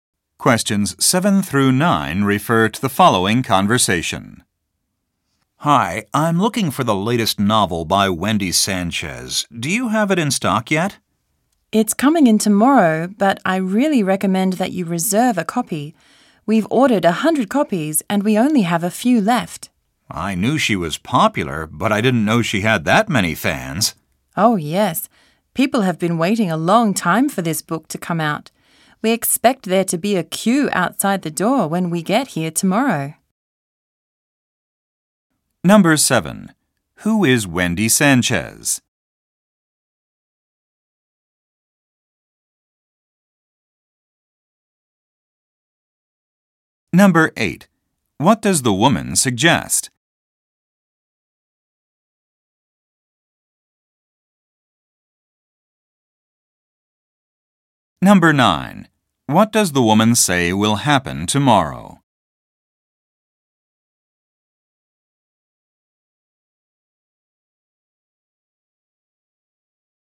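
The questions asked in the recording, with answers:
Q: Who is Wendy Sanchez?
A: A novelist (author)

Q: What does the woman suggest?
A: Reserving a copy of the book

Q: What does the woman say will happen tomorrow?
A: People will line up outside the store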